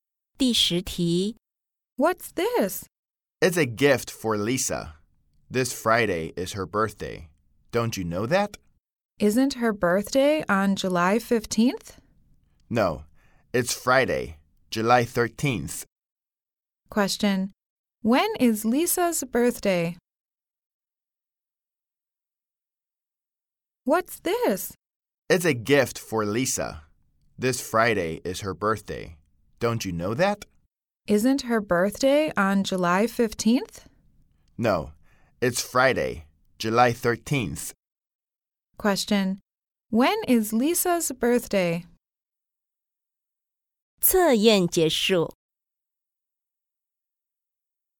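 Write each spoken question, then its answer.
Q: When is Lisa's birthday?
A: Friday, July 13th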